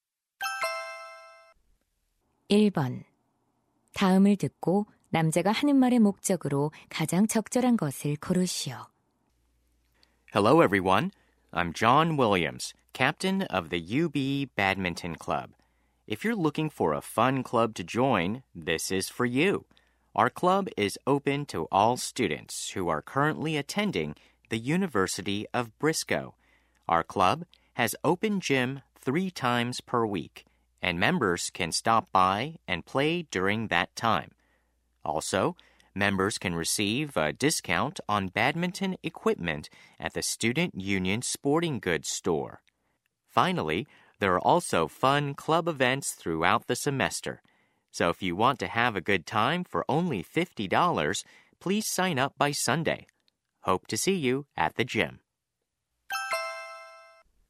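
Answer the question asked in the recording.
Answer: 배드민턴 동아리 가입을 권유하려고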